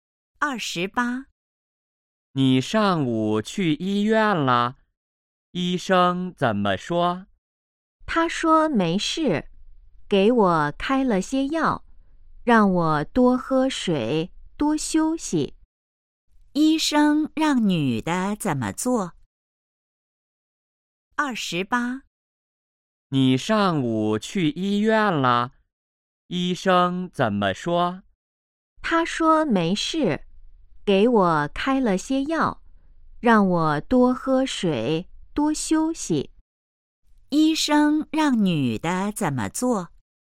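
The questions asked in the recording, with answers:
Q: 医生让女的怎么做?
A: 吃药,多喝水,多休息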